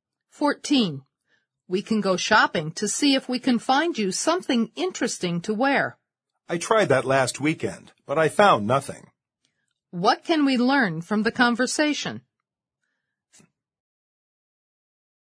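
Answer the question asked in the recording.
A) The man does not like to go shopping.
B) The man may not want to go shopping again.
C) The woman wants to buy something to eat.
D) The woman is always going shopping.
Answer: B) The man may not want to go shopping again.

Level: 四级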